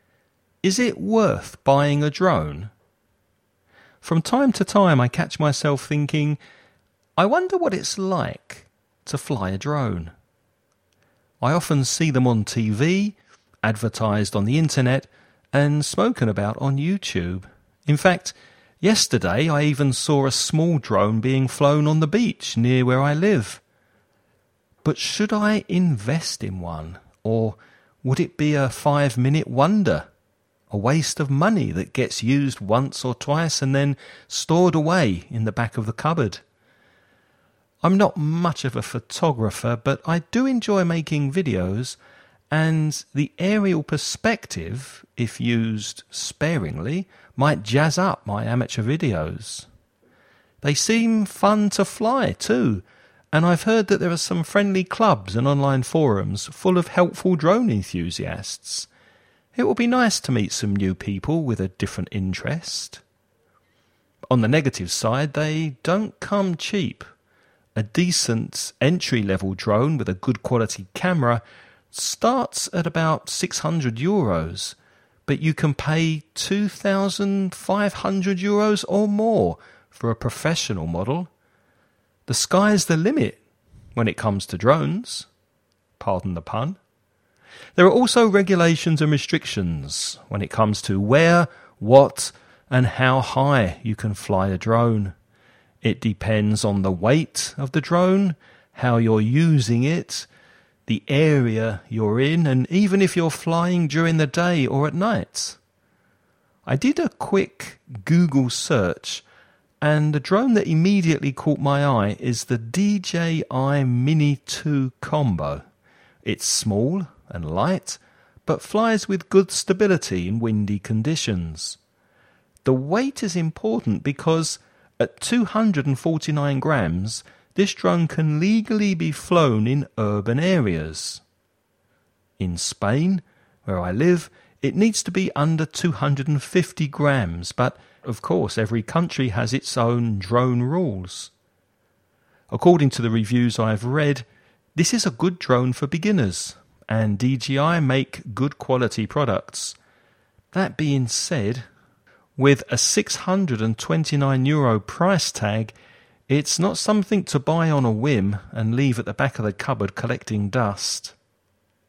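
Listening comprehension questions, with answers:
Listen and write the questions you hear.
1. Where did the man recently see a drone in action?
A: On the beach near where he lives

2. Which expression means 'something that you quickly lose interest in'?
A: A 5-minute wonder

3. What's the minimum you can expect to pay for a reasonably good drone?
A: About 600 euros

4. How much does the DJI Mini 2 drone weigh?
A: 249 grams

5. How much does the DJI Mini 2 drone cost?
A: 629 euros

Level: nivel avanzado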